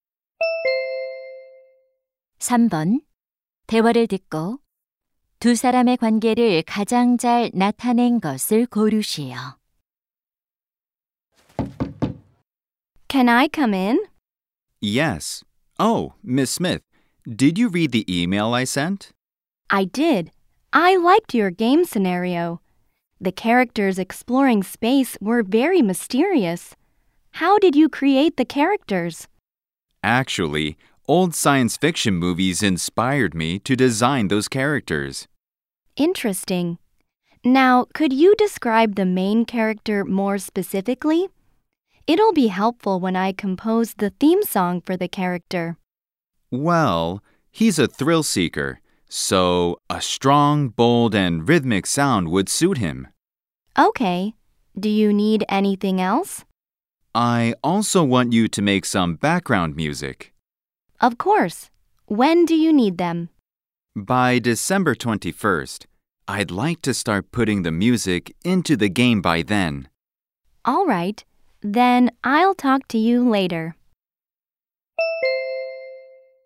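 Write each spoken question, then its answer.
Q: 대화를 듣고 두 사람의 관계를 가장 잘 나타낸 것을 고르시오.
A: 게임 개발자 - 작곡가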